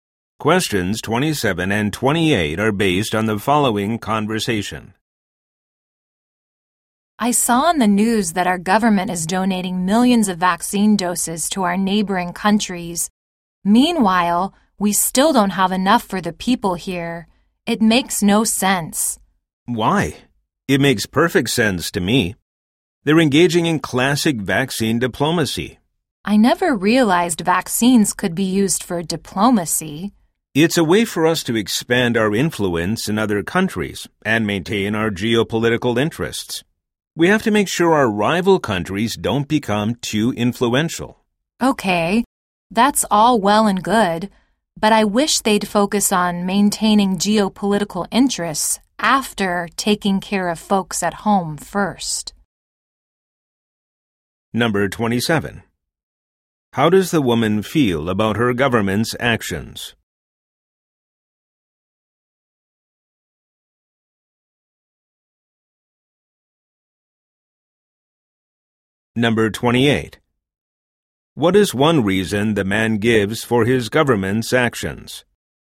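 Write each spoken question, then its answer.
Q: How does the woman feel about her government's actions?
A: She disapproves; it should take care of people at home first

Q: What is one reason the man gives for his government's actions?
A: To expand influence in other countries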